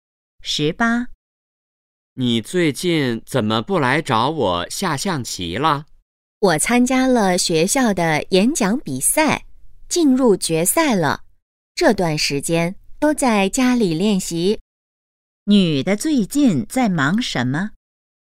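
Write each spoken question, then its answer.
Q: 女的最近在忙什么?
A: 练习演讲比赛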